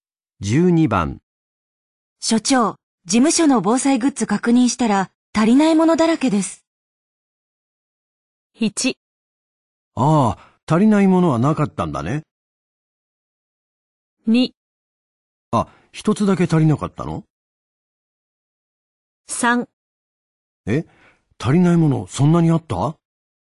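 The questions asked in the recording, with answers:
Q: 所長、事務所の防災グッズ確認したら足りないものだらけです。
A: 3: え、足りないものそんなにあった?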